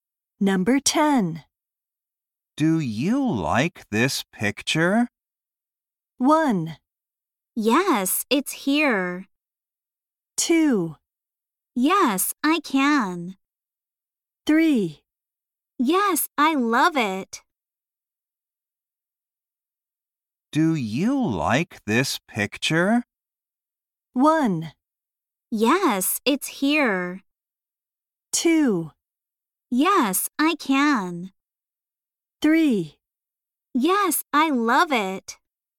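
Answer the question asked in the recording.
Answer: 3: Yes, I love it.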